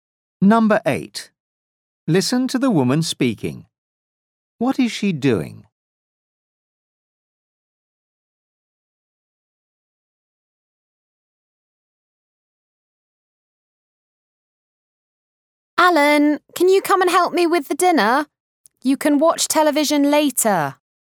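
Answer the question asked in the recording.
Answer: making dinner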